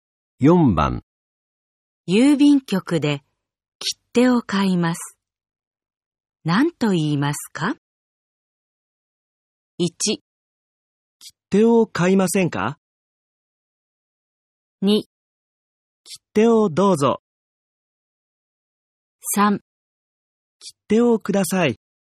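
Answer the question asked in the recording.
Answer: 3: 切手をください。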